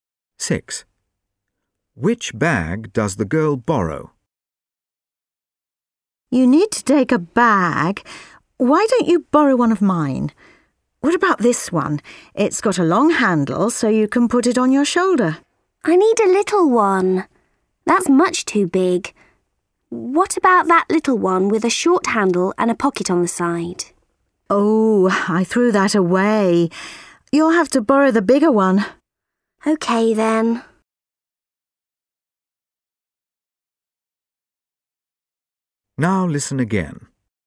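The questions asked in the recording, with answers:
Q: Which bag does the girl borrow?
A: The bigger bag with a long handle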